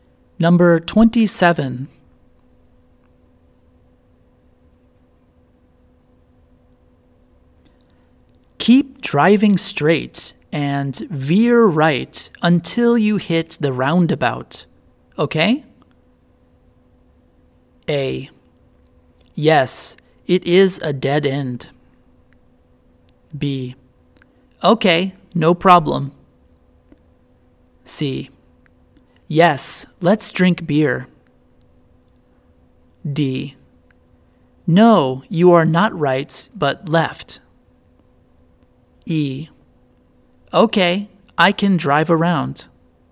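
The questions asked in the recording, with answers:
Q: Keep driving straight and veer right until you hit the roundabout, okay?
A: B: Okay, no problem.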